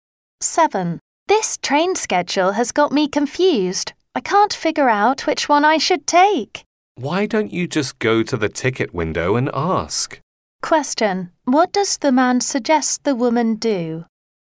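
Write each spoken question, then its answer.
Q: What does the man suggest the woman do?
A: Ask at the ticket window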